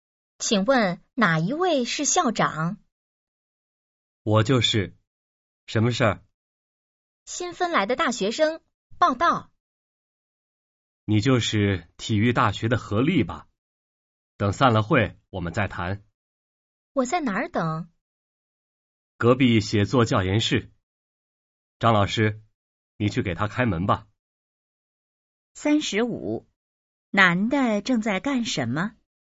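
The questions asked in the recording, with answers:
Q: 男的正在干什么?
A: 开会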